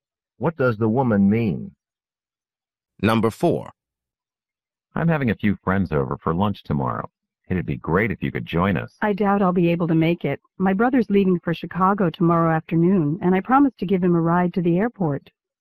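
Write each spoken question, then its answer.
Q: What does the woman imply?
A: She probably can't come to lunch because she has to drive her brother to the airport.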